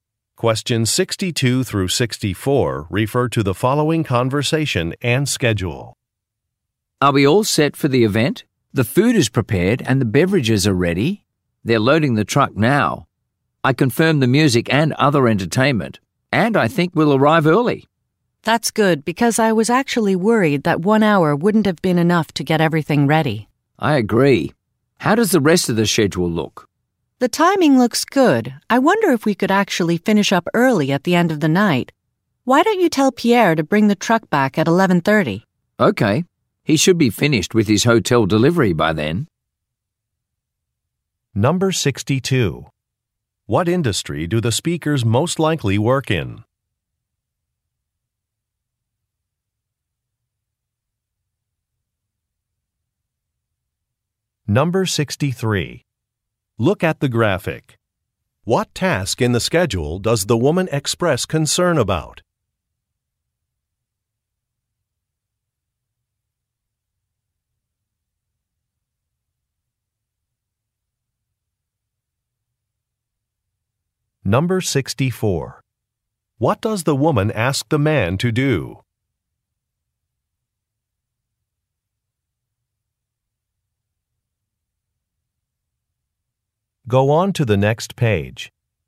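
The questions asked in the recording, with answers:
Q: What industry do the speakers most likely work in?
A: Catering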